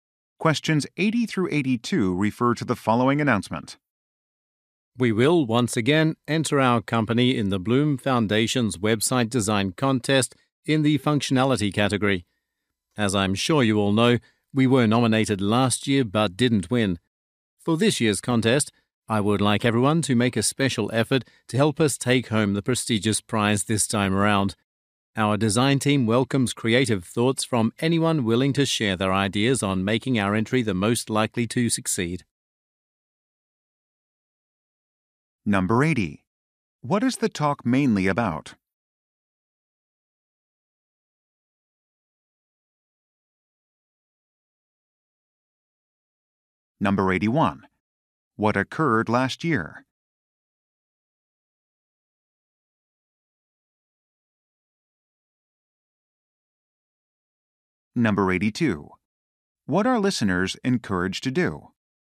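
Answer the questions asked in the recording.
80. Entering a website design contest
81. The company was nominated but didn't win
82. Share ideas with the design team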